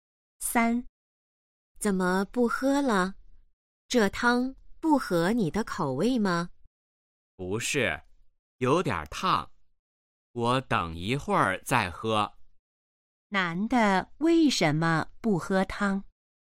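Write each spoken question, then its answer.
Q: 男的为什么不喝汤?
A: 汤有点烫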